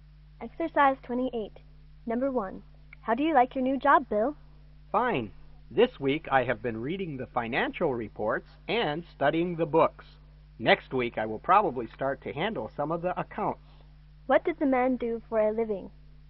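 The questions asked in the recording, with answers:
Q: What did the man do for a living?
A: He's an accountant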